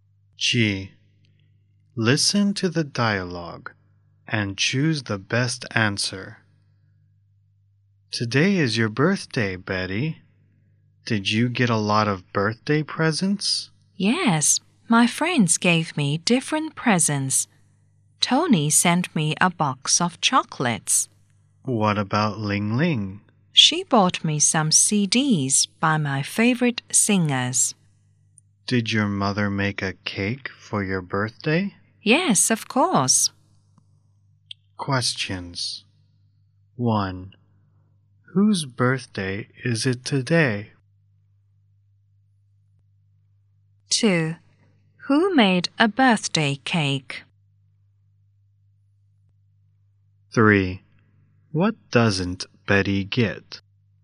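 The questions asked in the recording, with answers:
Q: Whose birthday is it today?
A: Betty's

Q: 2.Who made a birthday cake?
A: Betty's mother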